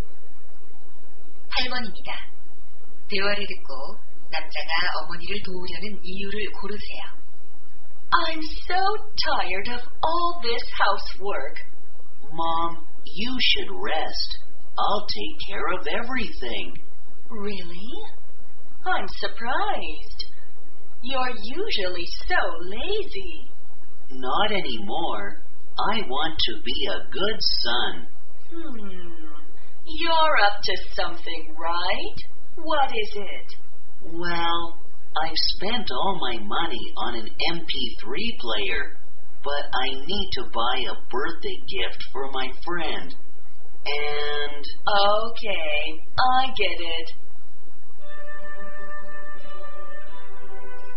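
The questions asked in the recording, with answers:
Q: 대화를 듣고 남자가 어머니를 도우려는 이유를 고르세요.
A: 친구 생일 선물을 살 돈이 필요해서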